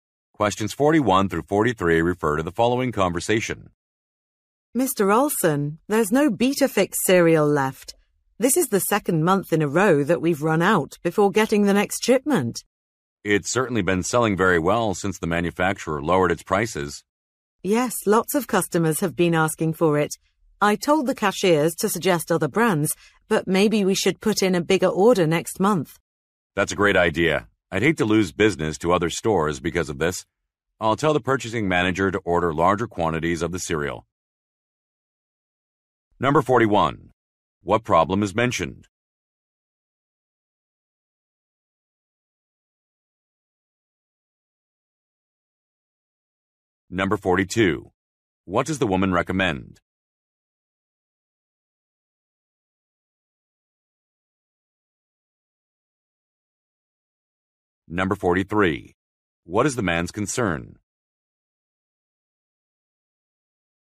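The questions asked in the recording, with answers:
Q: What problem is mentioned?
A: A cereal has sold out

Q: What does the woman recommend?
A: Placing a bigger order next month

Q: What is the man's concern?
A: Losing business to other stores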